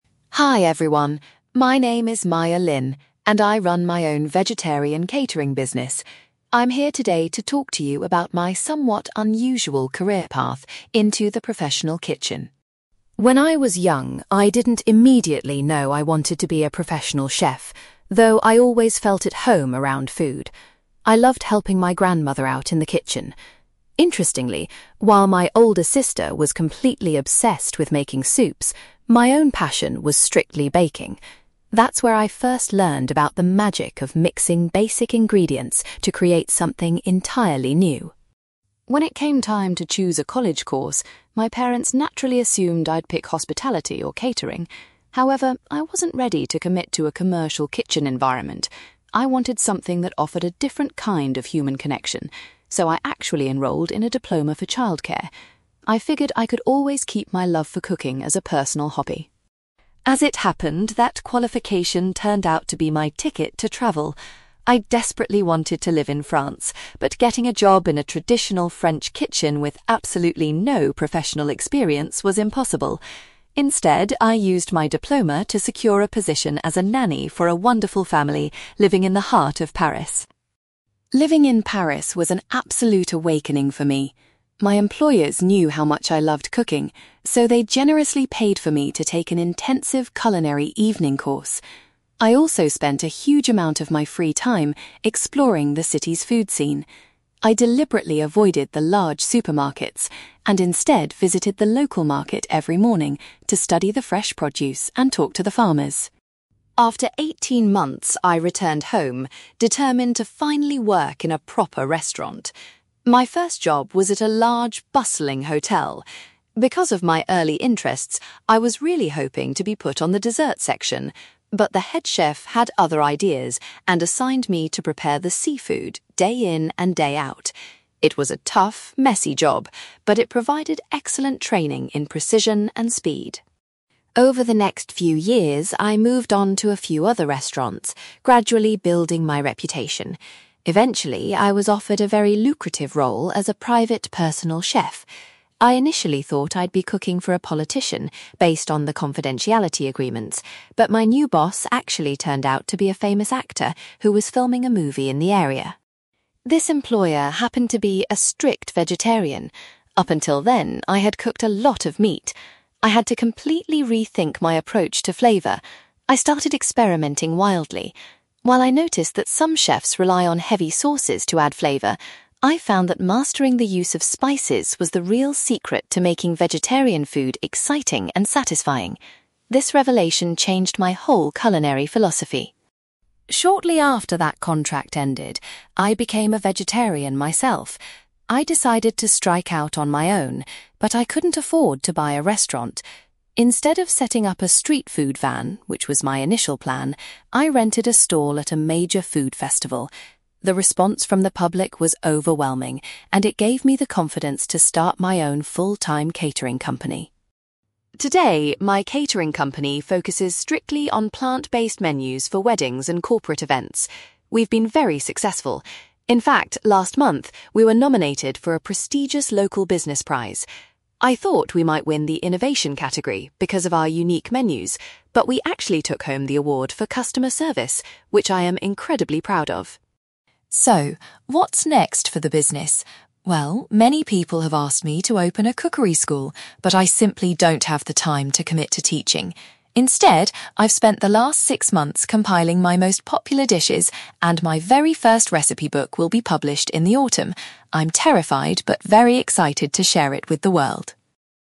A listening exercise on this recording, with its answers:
For questions 9-18, complete the sentences with a word or short phrase.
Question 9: Maya's passion for the culinary arts began while she was doing some (9)........................... alongside her grandmother.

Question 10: Maya chose to study for a qualification in (10)........................... rather than catering at college.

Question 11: Maya's qualification helped her to find employment as a (11)........................... in Paris.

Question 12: Maya spent time looking at ingredients at a (12)........................... to learn about French produce.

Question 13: In her first restaurant job, Maya was tasked with preparing the (13)........................... on the menu.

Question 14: Maya later worked as a personal chef for a well-known (14)........................... .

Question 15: Maya discovered that adding different (15)........................... was the best way to make vegetarian dishes interesting.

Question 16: Maya's vegetarian food business began with a stall at a (16)........................... .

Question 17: Maya was particularly proud when her catering company won an award for its (17)........................... .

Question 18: Maya is currently looking forward to the publication of her first (18)........................... .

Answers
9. baking
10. childcare
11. nanny
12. local market
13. seafood
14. actor
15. spices
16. food festival
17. customer service
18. recipe book

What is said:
Maya Lin: Hi everyone, my name is Maya Lin, and I run my own vegetarian catering business. I'm here today to talk to you about my somewhat unusual career path into the professional kitchen.
When I was young, I didn't immediately know I wanted to be a professional chef, though I always felt at home around food. I loved helping my grandmother out in the kitchen. Interestingly, while my older sister was completely obsessed with making soups, my own passion was strictly baking. That's where I first learned about the magic of mixing basic ingredients to create something entirely new.
When it came time to choose a college course, my parents naturally assumed I'd pick hospitality or catering. However, I wasn't ready to commit to a commercial kitchen environment. I wanted something that offered a different kind of human connection, so I actually enrolled in a diploma for childcare. I figured I could always keep my love for cooking as a personal hobby.
As it happened, that qualification turned out to be my ticket to travel. I desperately wanted to live in France, but getting a job in a traditional French kitchen with absolutely no professional experience was impossible. Instead, I used my diploma to secure a position as a nanny for a wonderful family living in the heart of Paris.
Living in Paris was an absolute awakening for me. My employers knew how much I loved cooking, so they generously paid for me to take an intensive culinary evening course. I also spent a huge amount of my free time exploring the city's food scene. I deliberately avoided the large supermarkets and instead visited the local market every morning to study the fresh produce and talk to the farmers.
After eighteen months, I returned home, determined to finally work in a proper restaurant. My first job was at a large, bustling hotel. Because of my early interests, I was really hoping to be put on the dessert section, but the head chef had other ideas and assigned me to prepare the seafood day in and day out. It was a tough, messy job, but it provided excellent training in precision and speed.
Over the next few years, I moved on to a few other restaurants, gradually building my reputation. Eventually, I was offered a very lucrative role as a private, personal chef. I initially thought I'd be cooking for a politician based on the confidentiality agreements, but my new boss actually turned out to be a famous actor who was filming a movie in the area.
This employer happened to be a strict vegetarian. Up until then, I had cooked a lot of meat. I had to completely rethink my approach to flavour. I started experimenting wildly. While I noticed that some chefs rely on heavy sauces to add flavour, I found that mastering the use of spices was the real secret to making vegetarian food exciting and satisfying. This revelation changed my whole culinary philosophy.
Shortly after that contract ended, I became a vegetarian myself. I decided to strike out on my own, but I couldn't afford to buy a restaurant. Instead of setting up a street food van, which was my initial plan, I rented a stall at a major food festival. The response from the public was overwhelming, and it gave me the confidence to start my own full-time catering company.
Today, my catering company focuses strictly on plant-based menus for weddings and corporate events. We've been very successful. In fact, last month, we were nominated for a prestigious local business prize. I thought we might win the 'Innovation' category because of our unique menus, but we actually took home the award for customer service, which I am incredibly proud of.
So, what's next for the business? Well, many people have asked me to open a cookery school, but I simply don't have the time to commit to teaching. Instead, I've spent the last six months compiling my most popular dishes, and my very first recipe book will be published in the autumn. I'm terrified but very excited to share it with the world!

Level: B2